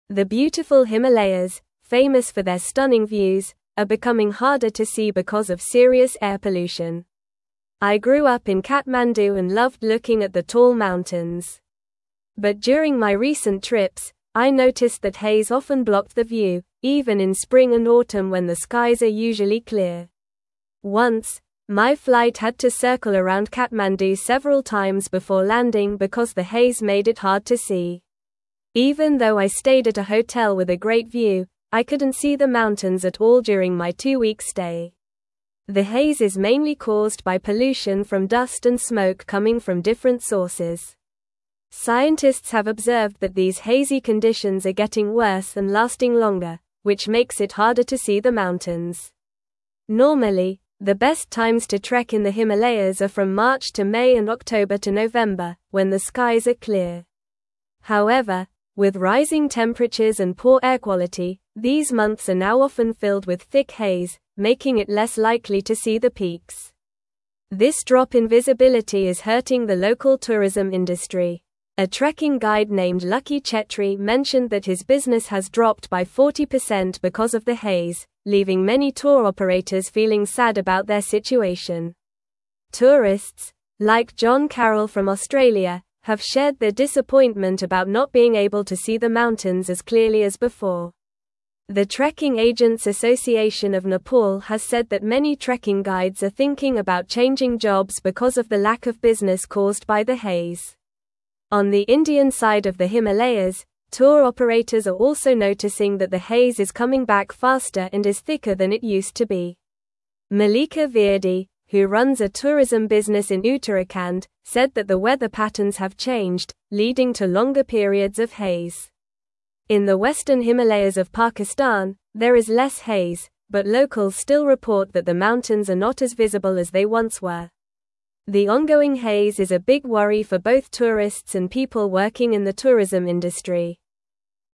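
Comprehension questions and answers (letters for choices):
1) What is causing the haze that blocks the view of the Himalayas?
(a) Heavy rainfall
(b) Pollution from dust and smoke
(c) Snowstorms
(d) Earthquakes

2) When are the best times to trek in the Himalayas?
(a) June to August and December to February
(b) January to March and September to October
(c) March to May and October to November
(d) April to June and November to December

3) How much has Lucky Chhetri's business dropped due to the haze?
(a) 20%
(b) 60%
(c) 30%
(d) 40%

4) What has the Trekking Agents Association of Nepal reported about trekking guides?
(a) Many are considering changing jobs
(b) They are all very happy with the current situation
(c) They are planning to increase their prices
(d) They have started offering new tours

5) In which region of the Himalayas is the haze reportedly coming back faster?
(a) The western Himalayas of Pakistan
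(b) The Indian side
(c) The eastern Himalayas of Nepal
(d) The southern Himalayas of Bhutan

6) What has Malika Virdi observed about the weather patterns in Uttarakhand?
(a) They have changed, leading to longer periods of haze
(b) They have improved, allowing for clearer views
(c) They remain the same as before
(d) They have become more unpredictable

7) What impact does the haze have on tourists visiting the Himalayas?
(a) They are enjoying the new weather conditions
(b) They are spending more time outdoors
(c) They are disappointed by the lack of visibility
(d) They are taking more photographs than ever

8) What is a major concern for people working in the tourism industry in the Himalayas?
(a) The increase in tourist numbers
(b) The rise in hotel prices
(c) The availability of trekking equipment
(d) The ongoing haze affecting visibility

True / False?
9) The haze is mainly caused by pollution from dust and smoke.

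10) Some trekking guides are not considering changing jobs because their business has decreased significantly.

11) The local tourism industry is flourishing due to the reduced visibility caused by haze.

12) The Himalayas are known for their beautiful views, but air pollution is making it harder to see them.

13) Haze often blocks the view of the Himalayas, even during typically clear seasons like spring and autumn.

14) Tour operators in both India and Pakistan are not noticing increased haze affecting visibility of the mountains.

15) The author grew up in Kathmandu and didn't enjoy looking at the mountains.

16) The best times to trek in the Himalayas are usually from March to May and October to November.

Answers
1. b
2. c
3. d
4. a
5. b
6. a
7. c
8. d
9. True
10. False
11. False
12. True
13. True
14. False
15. False
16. True

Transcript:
The beautiful Himalayas, famous for their stunning views, are becoming harder to see because of serious air pollution. 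I grew up in Kathmandu and loved looking at the tall mountains. But during my recent trips, I noticed that haze often blocked the view, even in spring and autumn when the skies are usually clear. Once, my flight had to circle around Kathmandu several times before landing because the haze made it hard to see. Even though I stayed at a hotel with a great view, I couldn't see the mountains at all during my two-week stay.
The haze is mainly caused by pollution from dust and smoke coming from different sources. Scientists have observed that these hazy conditions are getting worse and lasting longer, which makes it harder to see the mountains. Normally, the best times to trek in the Himalayas are from March to May and October to November, when the skies are clear. However, with rising temperatures and poor air quality, these months are now often filled with thick haze, making it less likely to see the peaks.
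This drop in visibility is hurting the local tourism industry. A trekking guide named Lucky Chhetri mentioned that his business has dropped by 40% because of the haze, leaving many tour operators feeling sad about their situation. Tourists, like John Carrol from Australia, have shared their disappointment about not being able to see the mountains as clearly as before. The Trekking Agents Association of Nepal has said that many trekking guides are thinking about changing jobs because of the lack of business caused by the haze.
On the Indian side of the Himalayas, tour operators are also noticing that the haze is coming back faster and is thicker than it used to be. Malika Virdi, who runs a tourism business in Uttarakhand, said that the weather patterns have changed, leading to longer periods of haze. In the western Himalayas of Pakistan, there is less haze, but locals still report that the mountains are not as visible as they once were. 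The ongoing haze is a big worry for both tourists and people working in the tourism industry.

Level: Level 3 – Upper Intermediate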